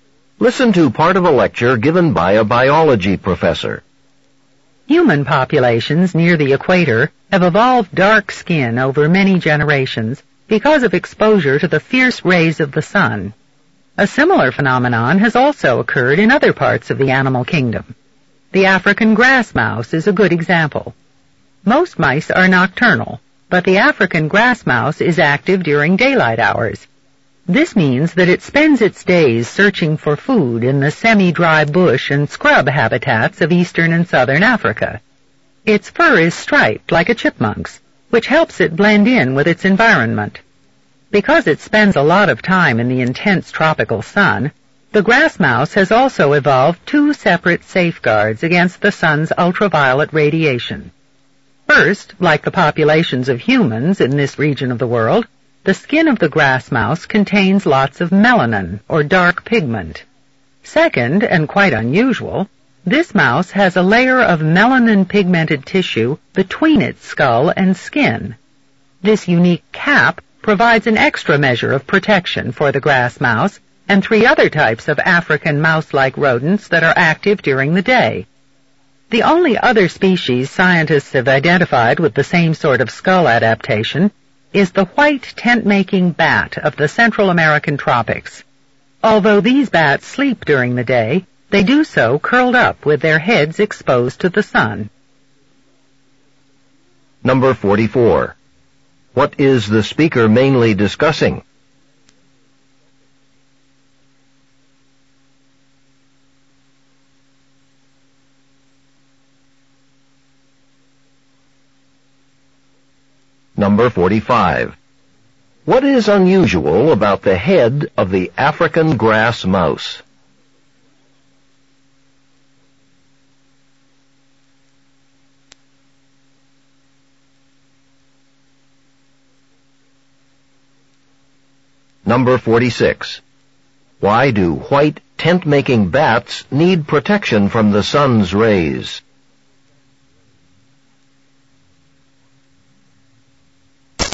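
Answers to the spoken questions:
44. How some animals have evolved protection against the sun's ultraviolet rays
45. It has a layer of melanin-pigmented tissue between its skull and skin
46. They sleep during the day with their heads exposed to the sun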